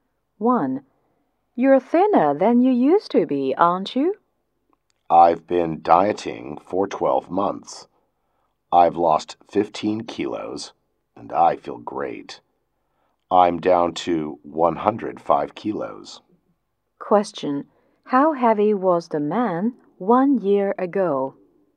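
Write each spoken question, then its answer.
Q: How heavy was the man 1 year ago?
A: 120 kilos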